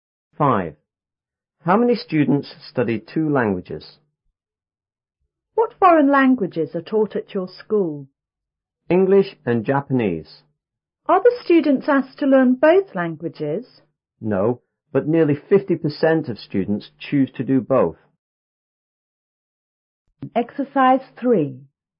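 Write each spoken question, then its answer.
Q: How many students study 2 languages?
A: Nearly 50% of students.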